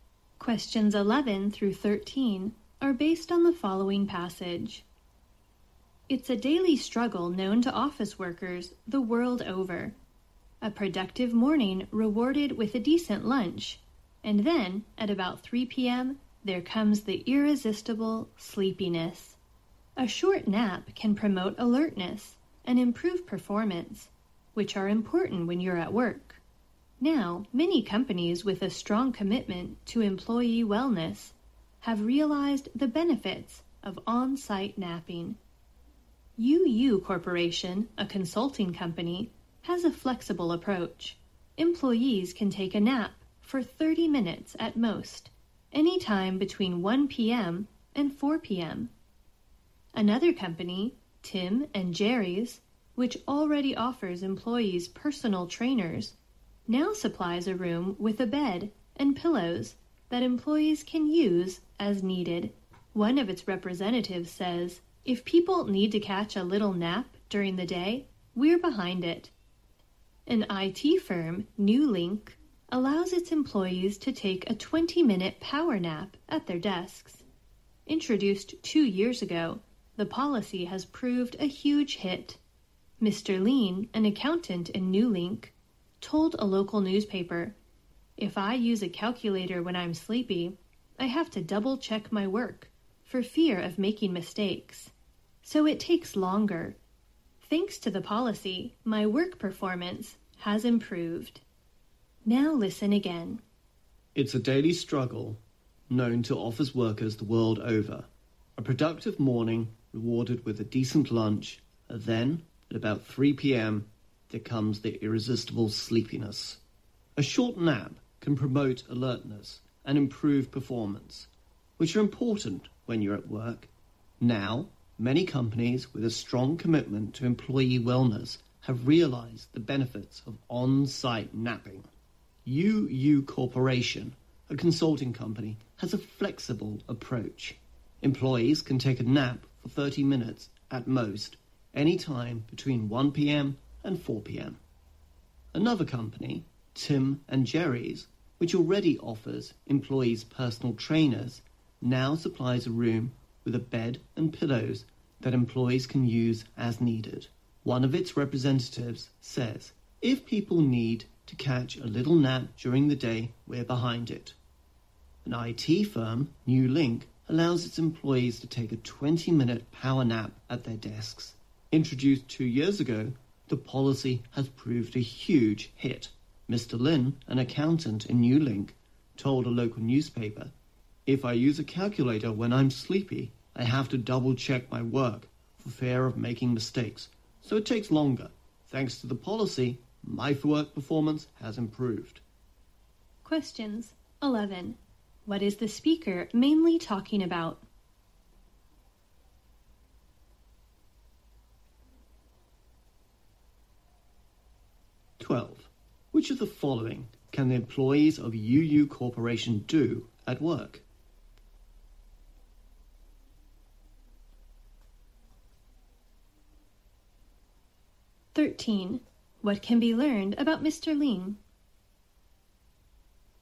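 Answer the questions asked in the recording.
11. Napping at work
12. Take a nap of up to 30 minutes between 1 p.m. and 4 p.m.
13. His work performance has improved because of the nap policy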